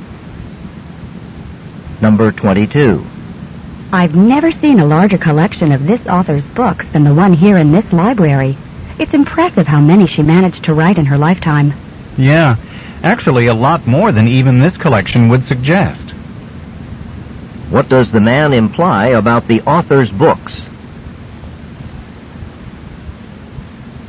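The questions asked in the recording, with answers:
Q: What does the man imply about the author's books?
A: She wrote many more books than the library has.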